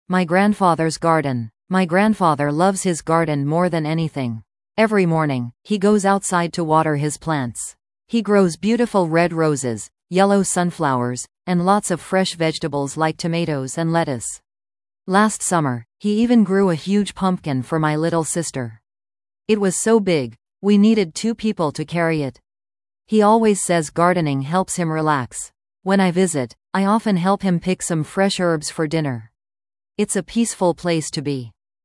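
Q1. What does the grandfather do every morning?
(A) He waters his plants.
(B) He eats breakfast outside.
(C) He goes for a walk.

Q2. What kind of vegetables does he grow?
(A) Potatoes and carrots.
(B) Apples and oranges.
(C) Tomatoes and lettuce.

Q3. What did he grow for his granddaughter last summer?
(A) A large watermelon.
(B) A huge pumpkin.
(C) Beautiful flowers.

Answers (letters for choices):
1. A
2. C
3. B

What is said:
My Grandfather's Garden
My grandfather loves his garden more than anything. Every morning, he goes outside to water his plants. He grows beautiful red roses, yellow sunflowers, and lots of fresh vegetables like tomatoes and lettuce. Last summer, he even grew a huge pumpkin for my little sister. It was so big, we needed two people to carry it! He always says gardening helps him relax. When I visit, I often help him pick some fresh herbs for dinner. It's a peaceful place to be.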